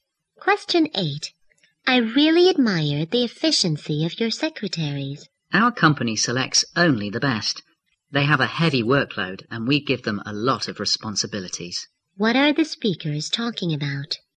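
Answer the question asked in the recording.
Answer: The efficiency of the company's secretaries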